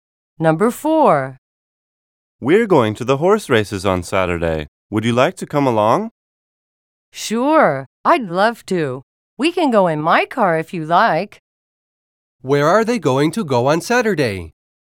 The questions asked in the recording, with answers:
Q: Where are they going to go on Saturday?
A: The man invited the woman to go to the horse races with him.